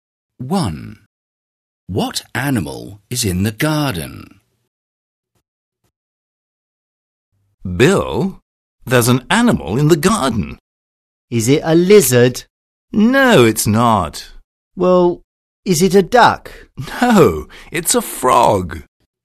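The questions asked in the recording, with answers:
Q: What animal is in the garden?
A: a frog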